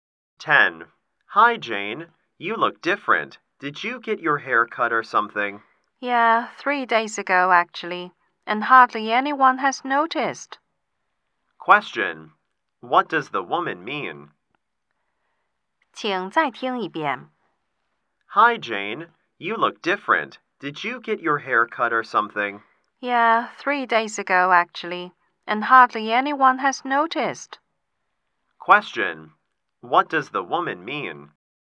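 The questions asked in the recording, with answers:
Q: What does the woman mean?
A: Few people noticed her haircut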